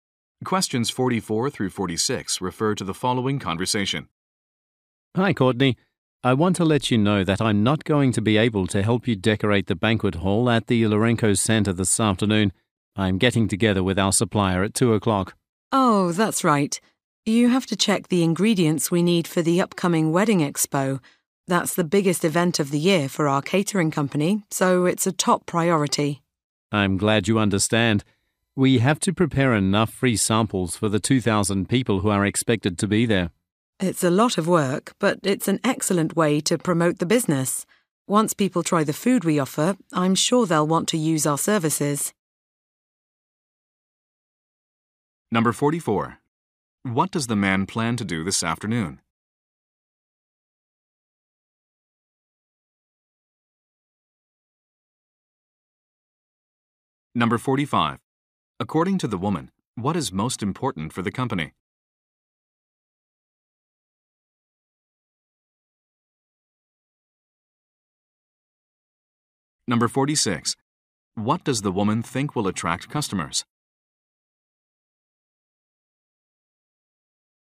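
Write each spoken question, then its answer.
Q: What does the man plan to do this afternoon?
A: Meet with a supplier

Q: According to the woman, what is most important for the company?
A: The upcoming wedding expo

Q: What does the woman think will attract customers?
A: Free food samples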